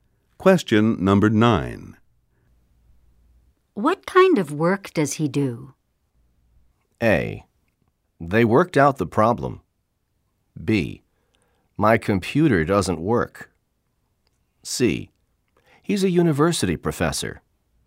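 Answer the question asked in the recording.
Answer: C: He's a university professor.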